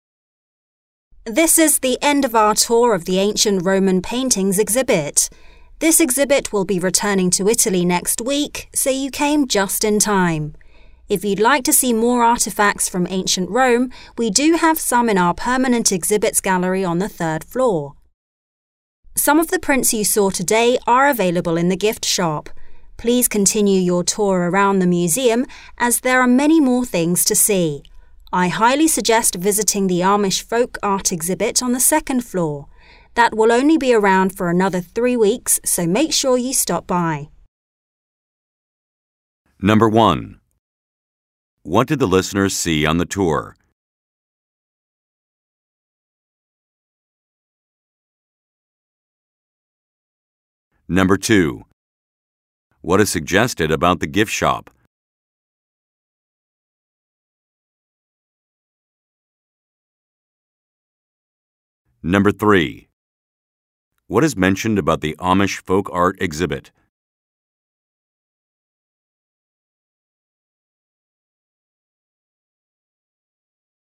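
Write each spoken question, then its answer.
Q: What did the listeners see on the tour?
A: Ancient Roman paintings

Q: What is suggested about the gift shop?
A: It sells prints of some of the paintings seen on the tour

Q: What is mentioned about the Amish folk art exhibit?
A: It is on the second floor and will only be there for about 3 more weeks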